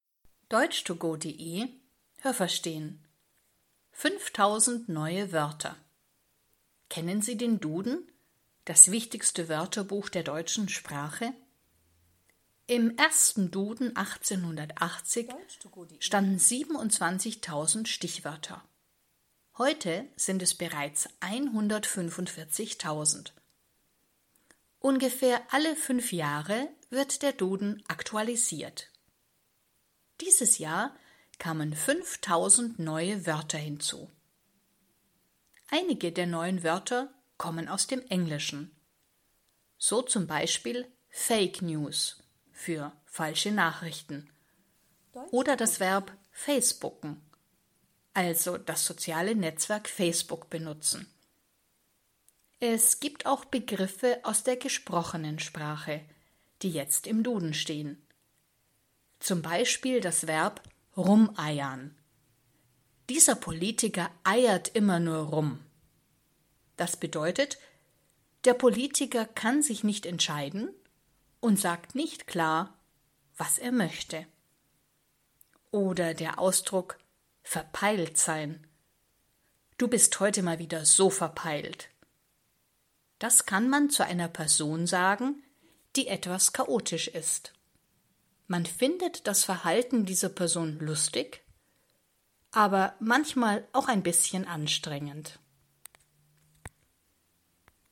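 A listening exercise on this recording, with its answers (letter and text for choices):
Was haben Sie gehört? Es gibt nur eine korrekte Antwort.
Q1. Den ersten Duden gab es ...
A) 1880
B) 1800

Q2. Heute stehen im Duden ...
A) 27.000 Wörter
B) 145.000 Wörter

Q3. Wie oft wird der Duden aktualisiert?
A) ungefähr alle 5 Jahre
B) ungefähr alle 15 Jahre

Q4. Der Begriff Fake News bedeutet ...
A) falsche Nachrichten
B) korrekte Nachrichten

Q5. Das Verb rumeiern kommt ...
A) aus der gesprochenen Sprache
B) aus der geschriebenen Sprache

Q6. Eine Person ist verpeilt, das heißt, die Person ist ...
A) chaotisch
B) sympathisch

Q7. Wenn man sagt, dass eine Person verpeilt ist, dann findet man das ...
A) immer sympathisch und lustig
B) lustig, aber manchmal anstrengend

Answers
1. A) 1880
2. B) 145.000 Wörter
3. A) ungefähr alle 5 Jahre
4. A) falsche Nachrichten
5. A) aus der gesprochenen Sprache
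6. A) chaotisch
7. B) lustig, aber manchmal anstrengend

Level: A2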